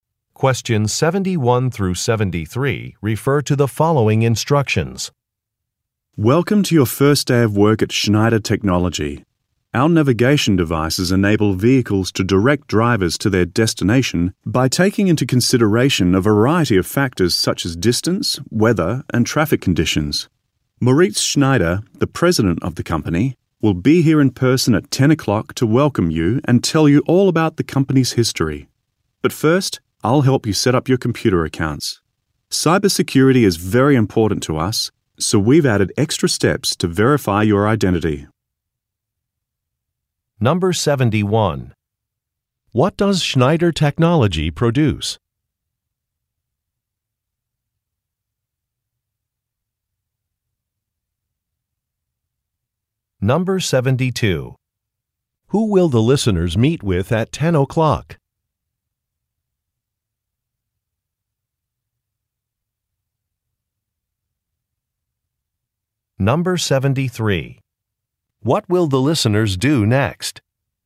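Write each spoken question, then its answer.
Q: What does Schneider Technology produce?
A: Navigation devices

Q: Who will the listeners meet with at 10 o'clock?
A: The company president, Moritz Schneider

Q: What will the listeners do next?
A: Set up their computer accounts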